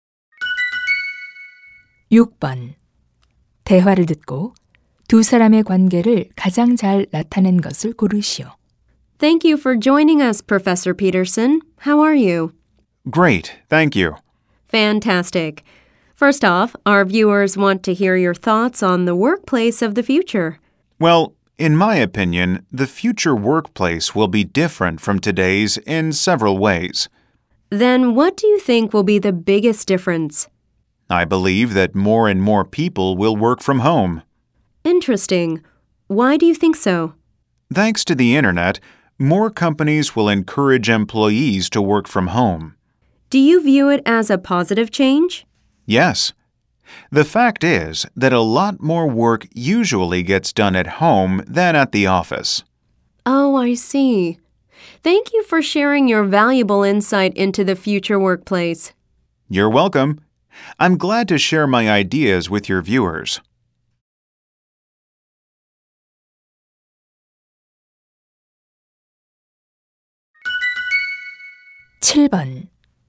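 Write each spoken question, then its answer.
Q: 대화를 듣고 두 사람의 관계를 가장 잘 나타낸 것을 고르시오.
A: 방송 진행자 - 교수(초대 손님)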